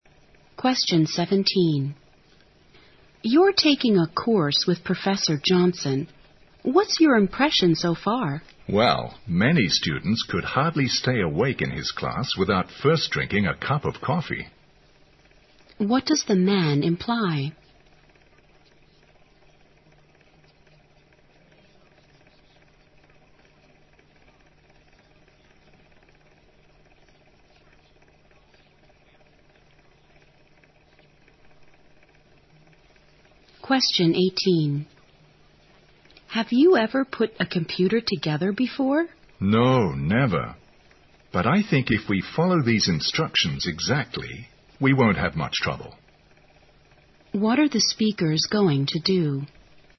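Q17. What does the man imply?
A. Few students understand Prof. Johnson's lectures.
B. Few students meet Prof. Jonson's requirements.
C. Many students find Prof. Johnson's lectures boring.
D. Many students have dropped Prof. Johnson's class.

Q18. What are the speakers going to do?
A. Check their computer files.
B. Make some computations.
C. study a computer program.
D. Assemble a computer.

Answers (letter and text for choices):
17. C. Many students find Prof. Johnson's lectures boring.
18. D. Assemble a computer.

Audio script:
W: You're taking a course with Professor Johnson. What's your impression so far?
M: Well, many students can hardly stay awake in his class without first drinking a cup of coffee.
Q: What does the man imply?
W: Have you ever put a computer together before?
M: No, never. But I think if we follow these instructions exactly, we won't have much trouble.
Q: What are the speakers going to do?

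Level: 大学英语四级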